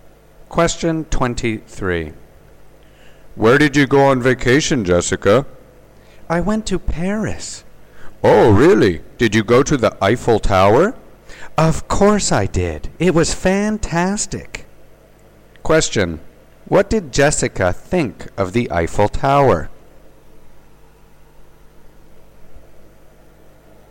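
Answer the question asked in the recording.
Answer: It was fantastic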